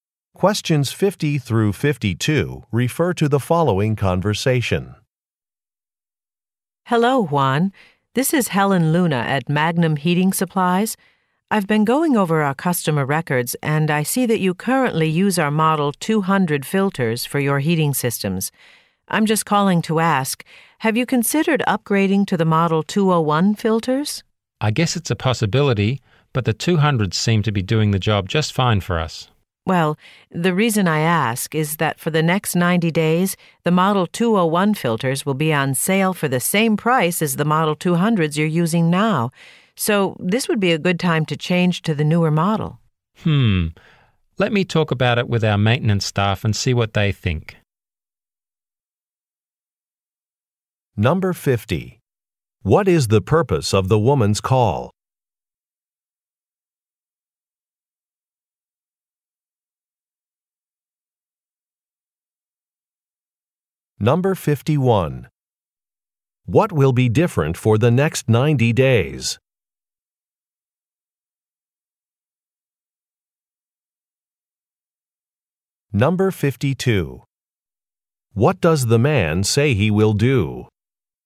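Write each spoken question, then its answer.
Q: What is the purpose of the woman's call?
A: To suggest upgrading to Model 201 filters

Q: What will be different for the next 90 days?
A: Model 201 filters will sell for the Model 200 price

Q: What does the man say he will do?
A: Talk it over with his maintenance staff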